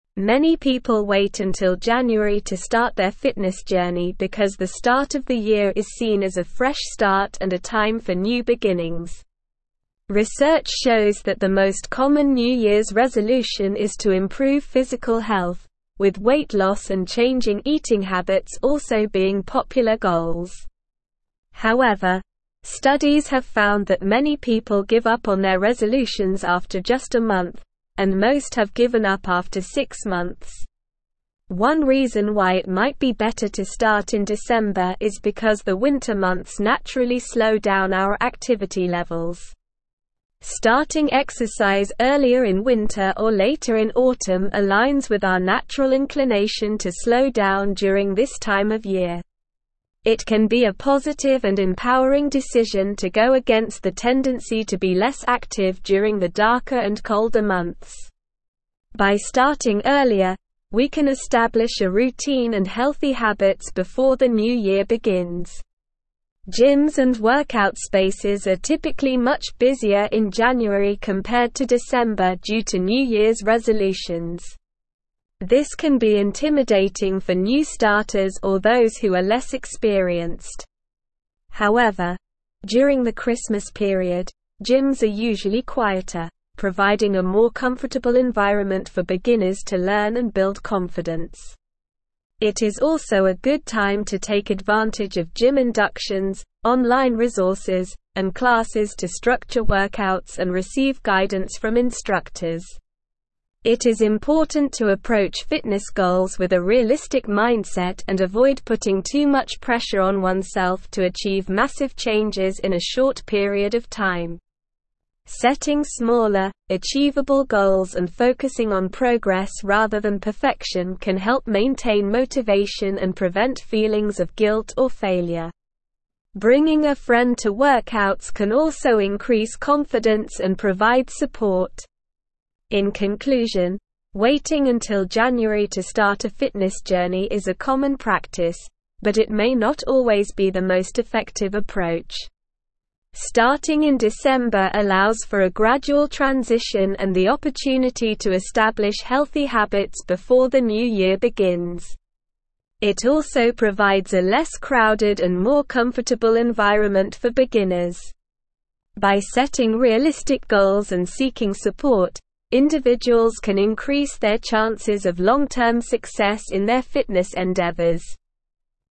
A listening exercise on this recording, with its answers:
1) Many (1)______ wait until (2)______ to start their (3)______ journey because the start of the year is seen as a fresh start and a time for new beginnings.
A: people

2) Many (1)______ wait until (2)______ to start their (3)______ journey because the start of the year is seen as a fresh start and a time for new beginnings.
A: January

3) Many (1)______ wait until (2)______ to start their (3)______ journey because the start of the year is seen as a fresh start and a time for new beginnings.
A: fitness

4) Research shows that the most common new year's resolution is to improve physical health, with weight loss and changing eating habits also being (4)______ goals.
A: popular

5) Starting exercise earlier in (5)______ or later in (6)______ aligns with our natural inclination to slow down during this time of year.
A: winter

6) Starting exercise earlier in (5)______ or later in (6)______ aligns with our natural inclination to slow down during this time of year.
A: autumn

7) It can be a positive and empowering decision to go against the tendency to be less active during the (7)______ and colder months.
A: darker

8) This can be intimidating for new starters or those who are less (8)______.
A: experienced

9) It is also a good time to take advantage of gym inductions, (9)______ resources, and classes to structure workouts and receive guidance from (10)______.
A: online

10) It is also a good time to take advantage of gym inductions, (9)______ resources, and classes to structure workouts and receive guidance from (10)______.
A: instructors

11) It is important to approach fitness goals with a realistic mindset and avoid putting too much pressure on oneself to achieve massive changes in a (11)______ period of time.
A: short

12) Setting smaller, achievable goals and focusing on progress rather than (12)______ can help maintain motivation and prevent feelings of guilt or failure.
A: perfection

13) In conclusion, waiting until January to start a fitness journey is a common practice, but it may not always be the most effective (13)______.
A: approach

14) Starting in December allows for a gradual transition and the (14)______ to establish healthy habits before the new year begins.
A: opportunity

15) By setting (15)______ goals and seeking support, (16)______ can increase their chances of long-term success in their fitness endeavors.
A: realistic

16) By setting (15)______ goals and seeking support, (16)______ can increase their chances of long-term success in their fitness endeavors.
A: individuals

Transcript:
Many people wait until January to start their fitness journey because the start of the year is seen as a fresh start and a time for new beginnings. Research shows that the most common new year's resolution is to improve physical health, with weight loss and changing eating habits also being popular goals. However, studies have found that many people give up on their resolutions after just a month, and most have given up after six months.
One reason why it might be better to start in December is because the winter months naturally slow down our activity levels. Starting exercise earlier in winter or later in autumn aligns with our natural inclination to slow down during this time of year. It can be a positive and empowering decision to go against the tendency to be less active during the darker and colder months. By starting earlier, we can establish a routine and healthy habits before the new year begins.
Gyms and workout spaces are typically much busier in January compared to December due to new year's resolutions. This can be intimidating for new starters or those who are less experienced. However, during the Christmas period, gyms are usually quieter, providing a more comfortable environment for beginners to learn and build confidence. It is also a good time to take advantage of gym inductions, online resources, and classes to structure workouts and receive guidance from instructors.
It is important to approach fitness goals with a realistic mindset and avoid putting too much pressure on oneself to achieve massive changes in a short period of time. Setting smaller, achievable goals and focusing on progress rather than perfection can help maintain motivation and prevent feelings of guilt or failure. Bringing a friend to workouts can also increase confidence and provide support.
In conclusion, waiting until January to start a fitness journey is a common practice, but it may not always be the most effective approach. Starting in December allows for a gradual transition and the opportunity to establish healthy habits before the new year begins. It also provides a less crowded and more comfortable environment for beginners. By setting realistic goals and seeking support, individuals can increase their chances of long-term success in their fitness endeavors.

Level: Level 4